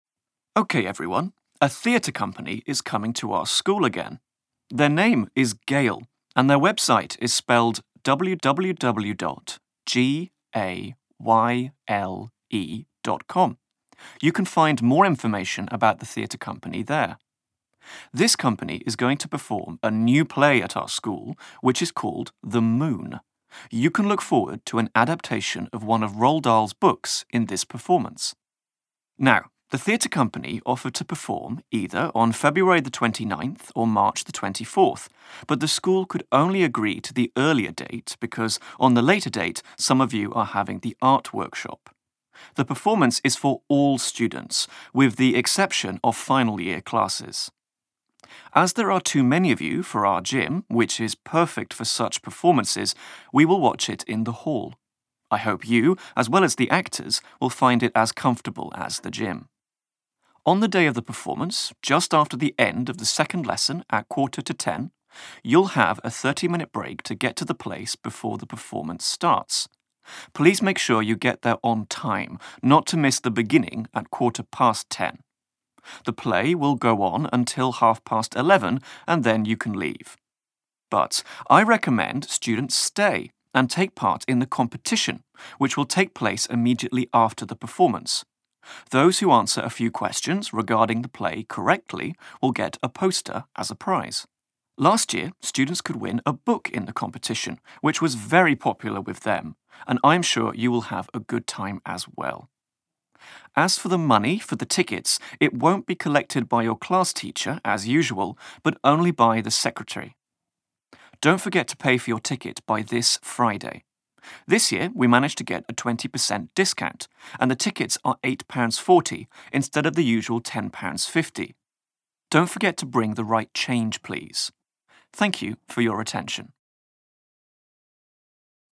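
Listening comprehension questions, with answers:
Uslyšíte učitele hovořit o divadelním představení. Na základě vyslechnuté nahrávky odpovězte v anglickém jazyce na otázky v úlohách 13–20. V odpovědích použijte nejvýše 3 slova. Čísla můžete zapisovat číslicemi.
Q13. What is the website of the theatre company coming to the school?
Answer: gayle

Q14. What is the name of the play to be performed at the school?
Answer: Moon

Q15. On what date is the performance at the school?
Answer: 29th February

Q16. Where in the school will the performance take place?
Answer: hall

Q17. What time does the performance start?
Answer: 10:15

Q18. What prize can students win in the competition after the performance?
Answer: a poster

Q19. Who will collect the money for the tickets this time?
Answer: the secretary

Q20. How much is a ticket for the performance this year?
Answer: 8.40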